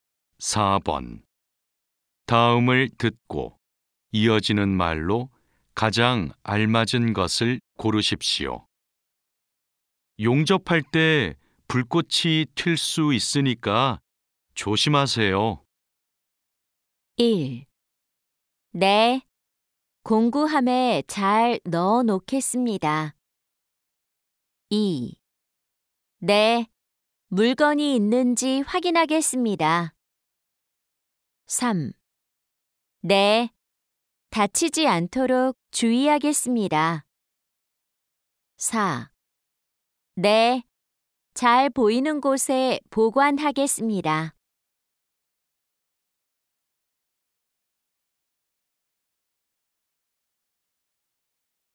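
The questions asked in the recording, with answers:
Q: 용접할 때 불꽃이 튈 수 있으니까 조심하세요.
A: 3: 네, 다치지 않도록 주의하겠습니다.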